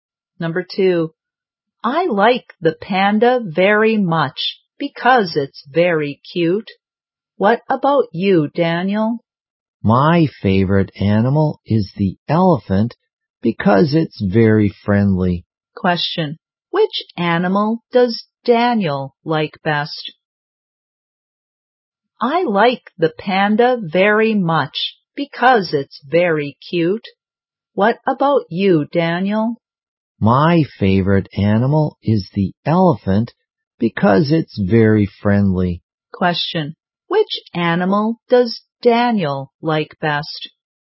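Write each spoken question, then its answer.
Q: Which animal does Daniel like best?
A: The elephant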